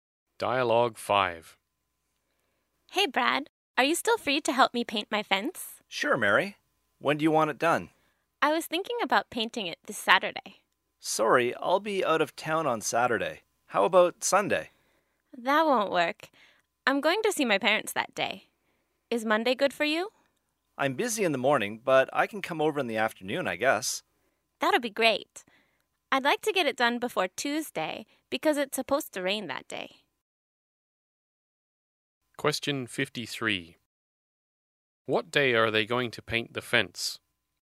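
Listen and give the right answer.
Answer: Monday afternoon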